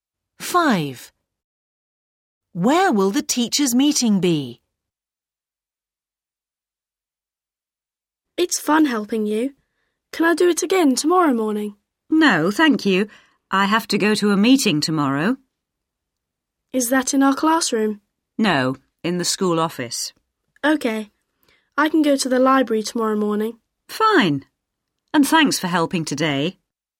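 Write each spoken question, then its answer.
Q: Where will the teachers' meeting be?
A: in the school office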